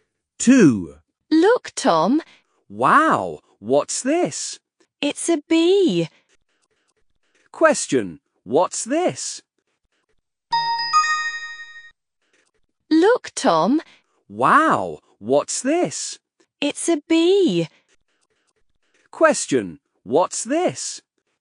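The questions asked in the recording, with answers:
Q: Question, what's this?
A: a bee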